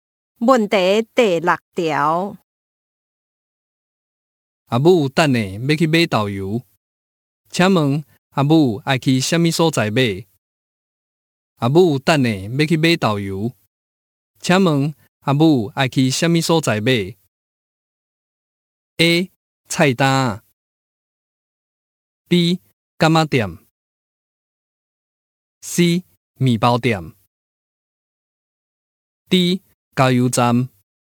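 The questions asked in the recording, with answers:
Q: 阿母等下要去买豆油,请问阿母爱去什么所在买?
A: B: 干妈店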